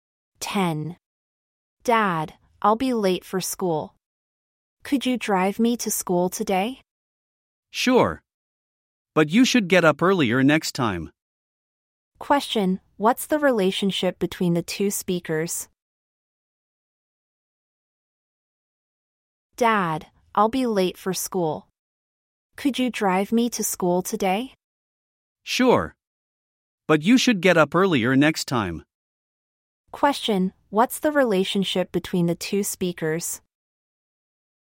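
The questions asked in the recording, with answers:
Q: Question, what's the relationship between the two speakers?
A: Father and child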